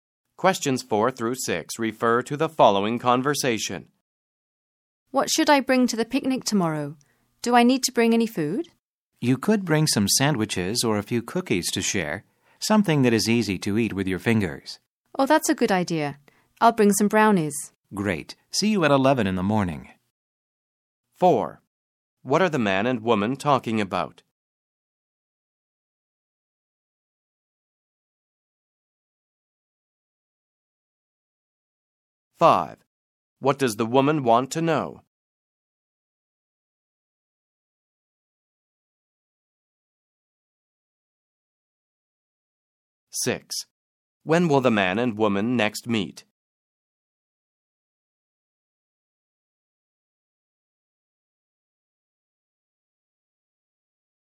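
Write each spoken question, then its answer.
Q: What are the man and woman talking about?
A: What to bring to a picnic

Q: When will the man and woman next meet?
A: At 11 in the morning tomorrow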